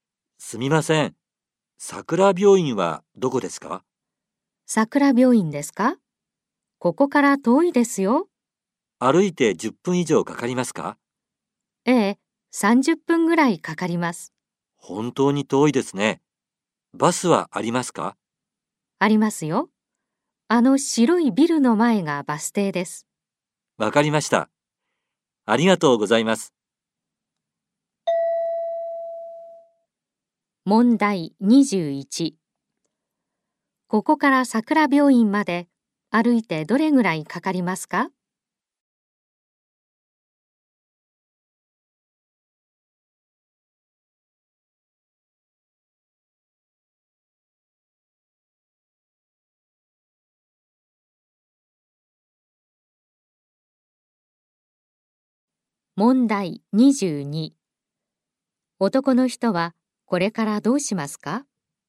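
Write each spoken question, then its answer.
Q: ここから桜病院まで歩いてどれぐらいかかりますか?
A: 30分ぐらい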